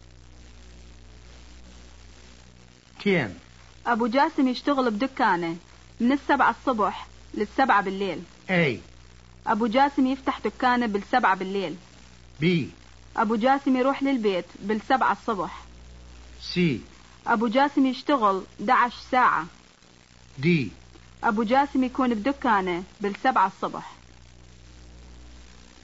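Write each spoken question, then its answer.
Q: أبو جاسم يشتغل بدكانه من 7 a.m. to 7 p.m.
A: D: أبو جاسم يكون بدكانه بالسبعة الصبح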